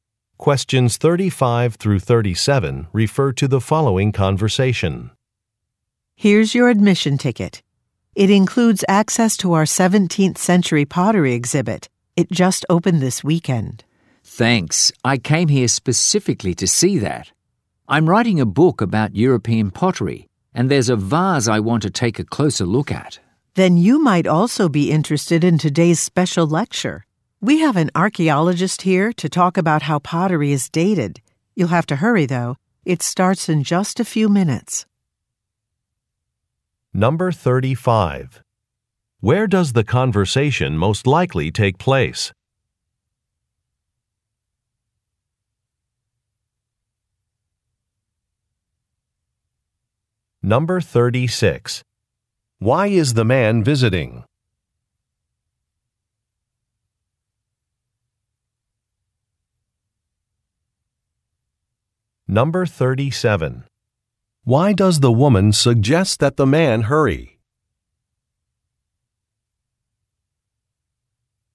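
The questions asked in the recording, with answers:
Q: Where does the conversation most likely take place?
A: At a museum

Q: Why is the man visiting?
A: To research a vase for a book he is writing about European pottery

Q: Why does the woman suggest that the man hurry?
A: A special lecture starts in a few minutes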